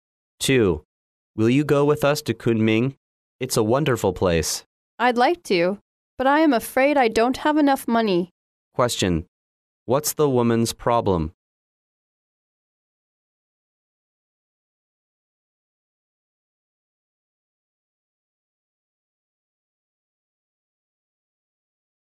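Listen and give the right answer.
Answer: She doesn't have enough money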